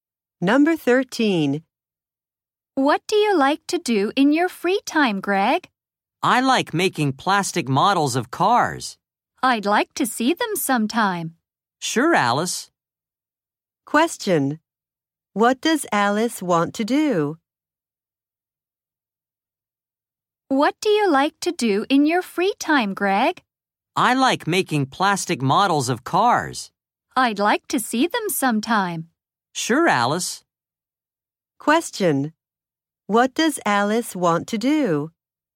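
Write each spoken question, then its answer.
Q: What does Alice want to do?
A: See Greg's plastic model cars.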